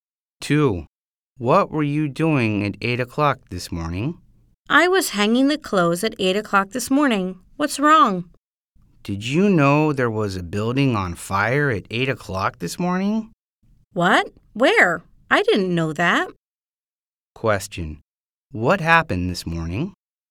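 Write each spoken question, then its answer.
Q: What happened this morning?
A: A building was on fire.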